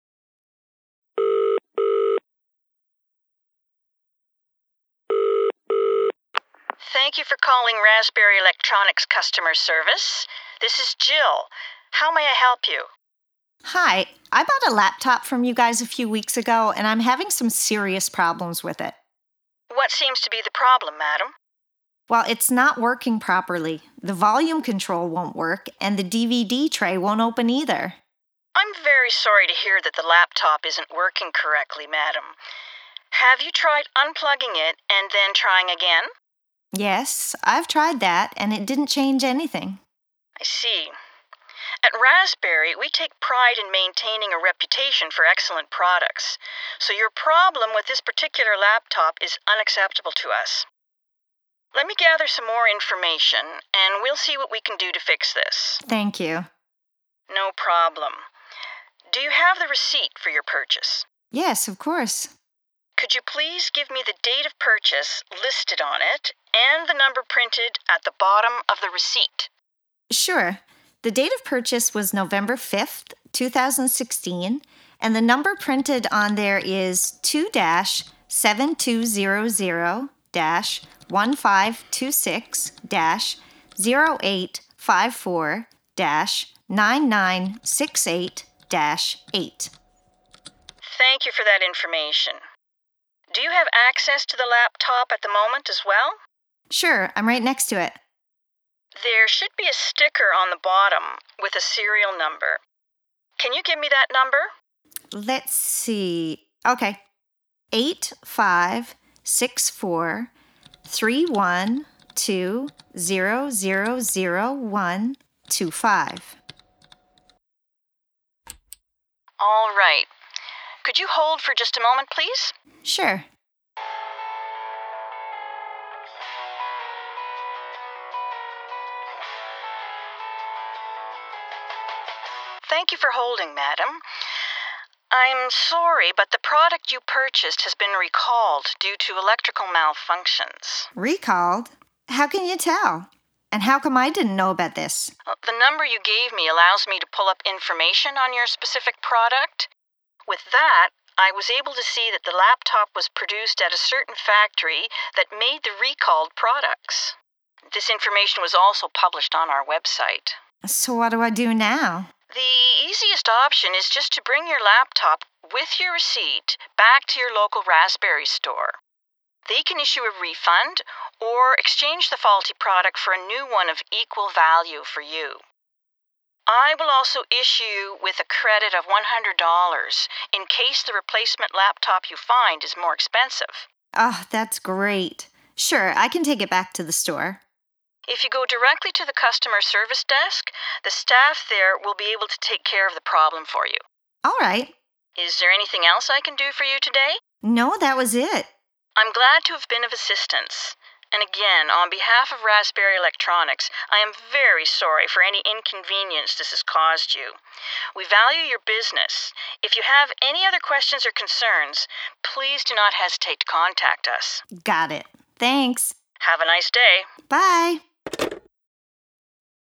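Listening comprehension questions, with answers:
Now, listen to the dialogue and answer the questions below.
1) What is the faulty product?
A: laptop

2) How many problems are there with the product?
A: two (volume control and DVD tray)

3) Why does the customer need the receipt?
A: to give the date of purchase and the number printed on it

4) On what date did the customer purchase the item?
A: November 5th, 2016

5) What is the product serial number?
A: 85643120001-25

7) Why is the item recalled?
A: due to electrical malfunctions

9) What does the customer need to do?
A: bring the laptop and receipt back to the local Raspberry store's customer service desk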